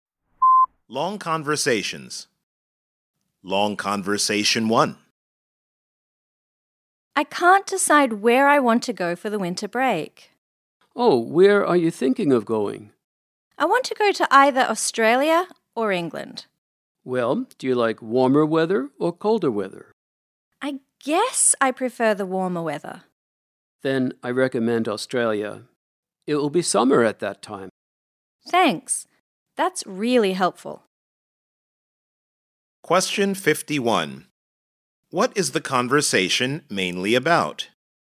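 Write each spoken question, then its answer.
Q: What is the conversation mainly about?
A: Deciding where to go for the winter break (Australia or England)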